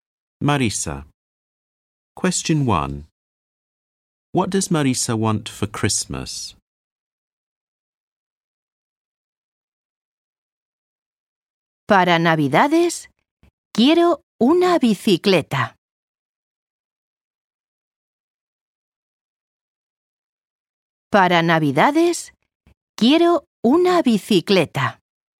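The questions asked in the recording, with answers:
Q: What does Marisa want for Christmas?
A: A bicycle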